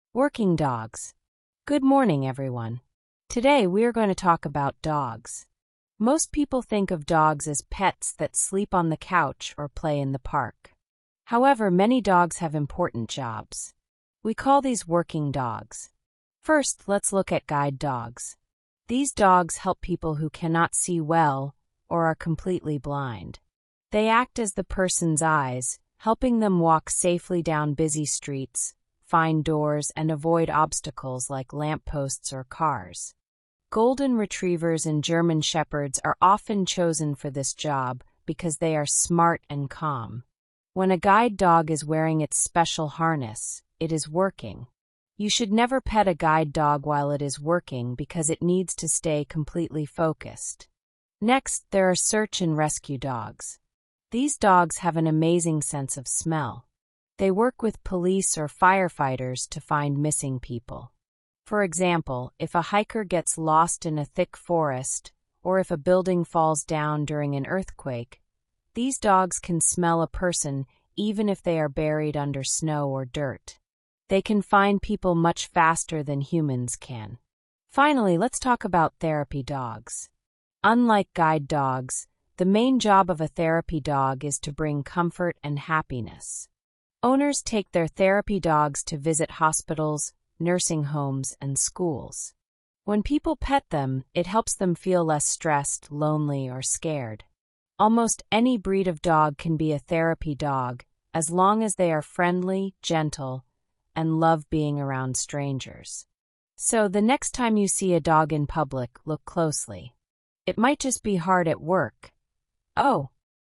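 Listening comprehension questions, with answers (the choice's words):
II. Read the following questions and choose the correct answer:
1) What is the main idea of this listening passage?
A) Why dogs make the best family pets.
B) How different dogs do important jobs to help people.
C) How to train your puppy to sit and stay.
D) Why German Shepherds are smart animals.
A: How different dogs do important jobs to help people.

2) According to the speaker, what do guide dogs do?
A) They look for lost hikers in the woods.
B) They cheer up sick people in hospitals.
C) They act as eyes for people who cannot see well.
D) They protect houses from dangerous strangers.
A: They act as eyes for people who cannot see well.

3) Why shouldn't you pet a guide dog when it is wearing a harness?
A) It might get scared and bite you.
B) It needs to focus on its job.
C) Its fur will get dirty.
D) The owner will get angry.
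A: It needs to focus on its job.

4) Which two dog breeds were specifically mentioned as good guide dogs?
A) Poodles and Pugs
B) German Shepherds and Golden Retrievers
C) Labradors and Huskies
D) Bulldogs and Boxers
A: German Shepherds and Golden Retrievers

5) Where do search and rescue dogs usually work?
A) In schools and libraries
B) On couches and in backyards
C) In hospitals and nursing homes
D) In forests and disaster areas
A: In forests and disaster areas

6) What special sense makes search and rescue dogs so good at their jobs?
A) Their excellent eyesight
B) Their amazing sense of smell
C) Their ability to hear quiet sounds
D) Their ability to run very fast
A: Their amazing sense of smell

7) What is the primary purpose of a therapy dog?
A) To guide people across busy streets.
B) To look for people buried under snow.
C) To bring comfort and happiness to people.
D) To guard police stations.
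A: To bring comfort and happiness to people.

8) Where would you be most likely to meet a therapy dog?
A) In a thick forest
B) Inside a nursing home or hospital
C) At a police station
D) Running wild in a park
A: Inside a nursing home or hospital

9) What is a major difference mentioned between guide dogs and therapy dogs?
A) Guide dogs must be large, but therapy dogs must be small.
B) People are encouraged to pet therapy dogs, but should not pet guide dogs while they work.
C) Guide dogs work with firefighters, while therapy dogs work with police.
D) Therapy dogs require more training than guide dogs.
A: People are encouraged to pet therapy dogs, but should not pet guide dogs while they work.

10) What is a requirement for a dog to become a therapy dog?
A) It must be a Golden Retriever.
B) It must know how to find missing hikers.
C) It must be friendly, gentle, and love strangers.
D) It must wear a special heavy harness at all times.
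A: It must be friendly, gentle, and love strangers.

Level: Low-Intermediate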